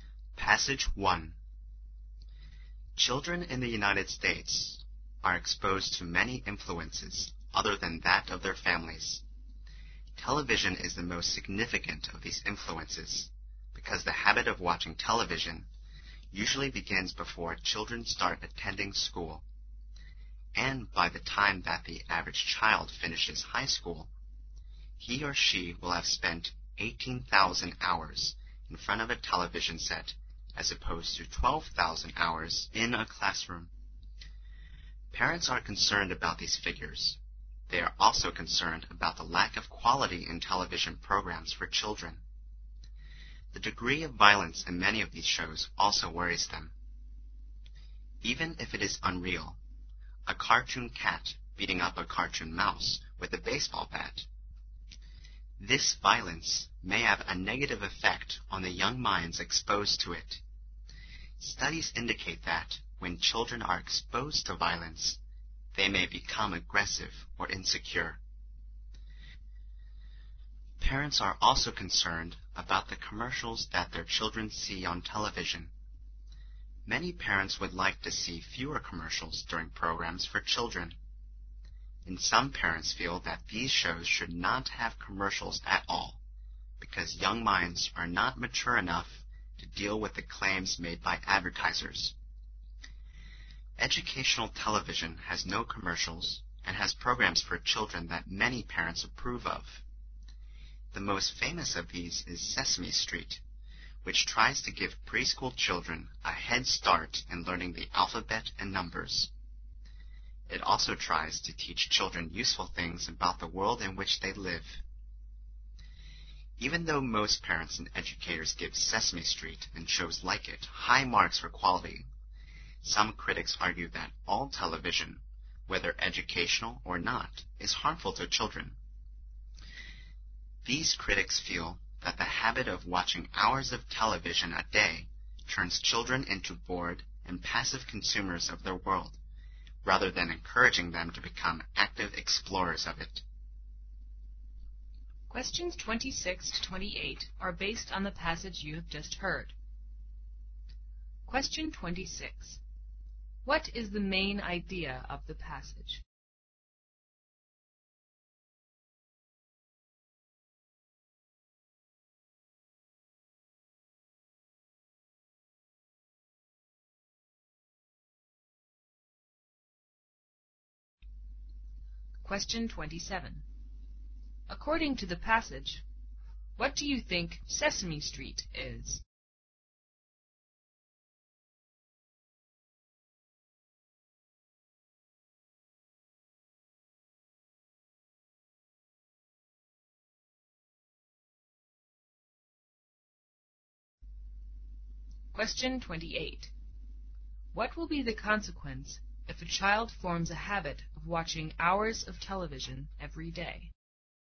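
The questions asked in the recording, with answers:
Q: According to the passage, what do you think Sesame Street is?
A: An educational TV program without commercials that helps preschool children learn the alphabet and numbers

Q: What will be the consequence if a child forms a habit of watching hours of television every day?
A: The child becomes a bored and passive consumer of the world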